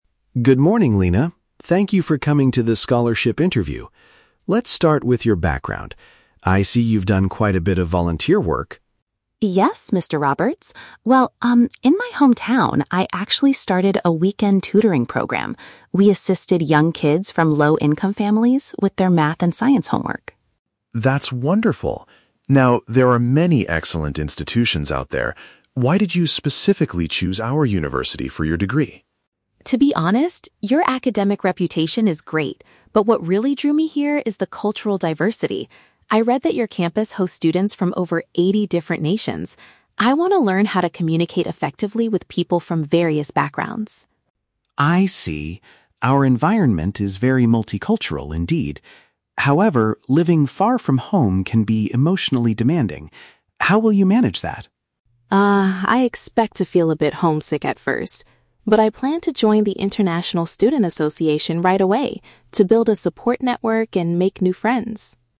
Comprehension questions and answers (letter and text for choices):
Listen to the interview between a university representative and a scholarship candidate. Read the questions below and choose the correct answer (A, B, or C) for each.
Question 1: What did the candidate do to contribute to her local community?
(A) She collected financial donations for families in need.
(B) She guided disadvantaged children with their schoolwork.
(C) She opened a weekend school to teach foreign languages.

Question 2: What is the primary reason the candidate wants to attend this specific university?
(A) She is eager to connect with people from a wide range of cultures.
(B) She believes it has the most difficult academic programs in the country.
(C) She wants to study in a location that is very close to her hometown.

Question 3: How does the candidate plan to handle the emotional challenges of living abroad?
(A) She will find a part-time job at the international student office.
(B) She will travel back to her hometown whenever she feels stressed.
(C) She intends to participate in a campus group to build a support system.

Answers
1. (B) She guided disadvantaged children with their schoolwork.
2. (A) She is eager to connect with people from a wide range of cultures.
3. (C) She intends to participate in a campus group to build a support system.

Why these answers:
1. The Key (Correct): Lina states that she "assisted young kids from low-income families with their math and science homework." (Paraphrased: assisted = guided; low-income families = disadvantaged; math and science homework = schoolwork).

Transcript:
Thank you for coming to the scholarship interview. Let's start with your background. I see you've done quite a bit of volunteer work.
Lina: Yes, Mr. Roberts. Well, um, in my hometown, I actually started a weekend tutoring program. We assisted young kids from low-income families with their math and science homework.
Mr. Roberts: That's wonderful. Now, there are many excellent institutions out there. Why did you specifically choose our university for your degree?
Lina: To be honest, your academic reputation is great, but what really drew me here is the cultural diversity. I read that your campus hosts students from over eighty different nations. I want to learn how to communicate effectively with people from various backgrounds.
Mr. Roberts: I see. Our environment is very multicultural, indeed. However, living far from home can be emotionally demanding. How will you manage that?
Lina: Ah, I expect to feel a bit homesick at first. But I plan to join the international student association right away to build a support network and make new friends.